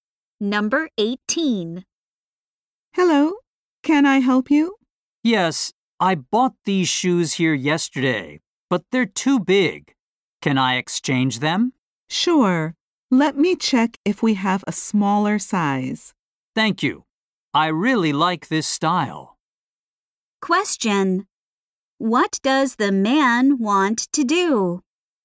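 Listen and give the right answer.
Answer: Exchange his shoes for a smaller size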